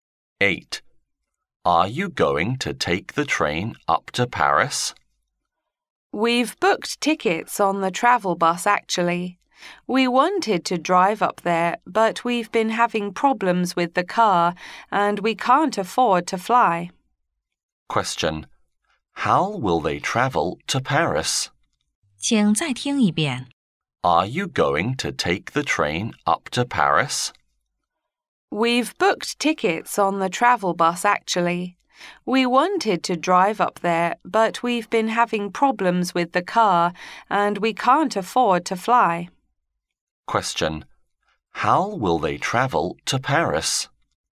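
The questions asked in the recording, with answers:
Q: How will they travel to Paris?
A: By bus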